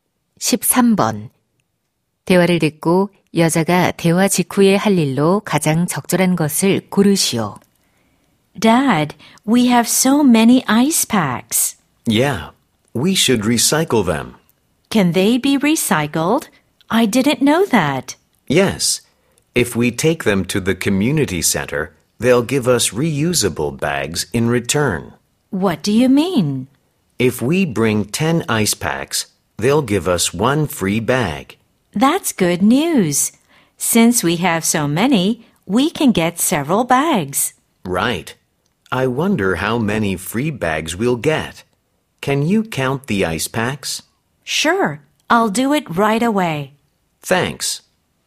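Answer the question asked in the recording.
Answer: 아이스팩 개수 세기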